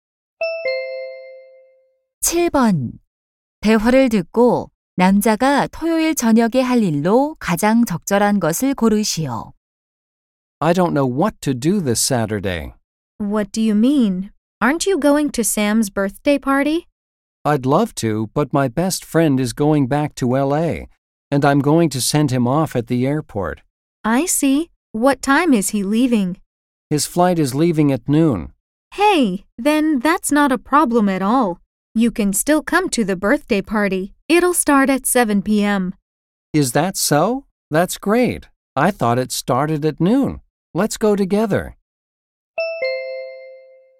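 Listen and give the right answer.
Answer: 샘의 생일 파티에 가기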